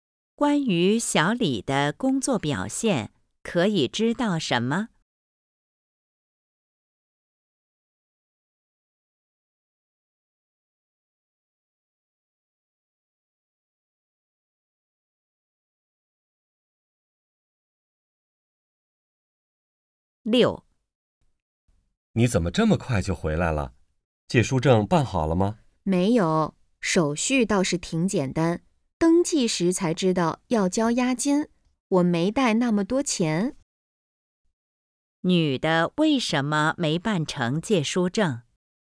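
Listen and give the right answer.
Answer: 要交押金,她没带够钱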